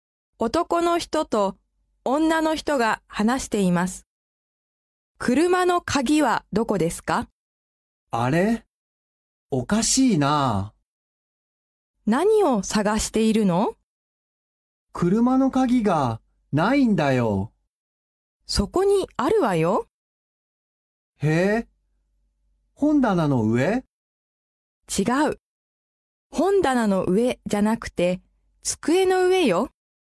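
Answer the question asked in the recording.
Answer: 机の上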